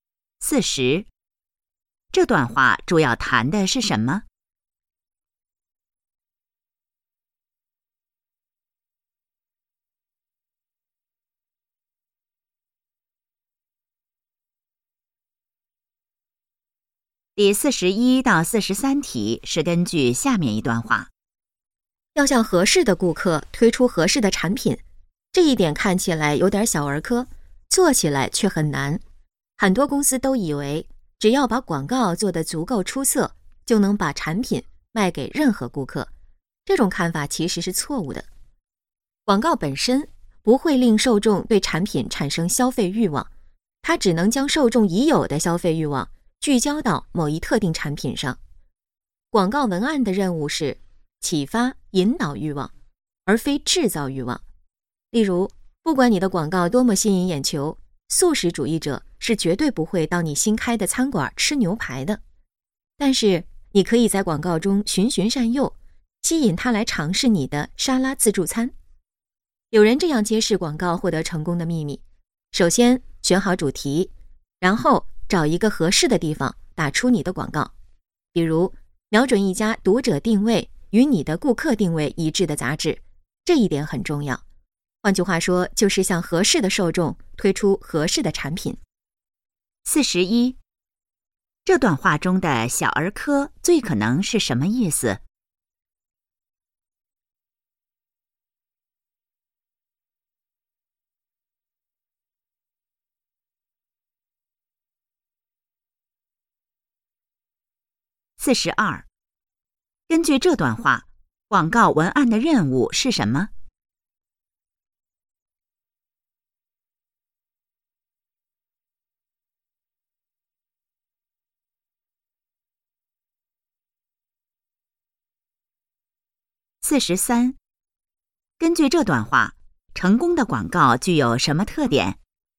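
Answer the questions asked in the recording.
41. 很简单
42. 启发引导欲望
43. 向合适的受众推出合适的产品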